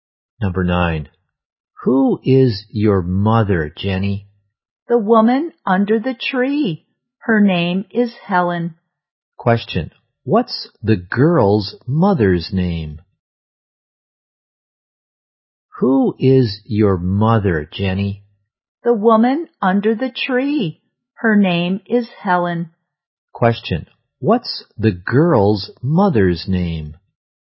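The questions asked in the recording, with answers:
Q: What's the girl's mother's name?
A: Helen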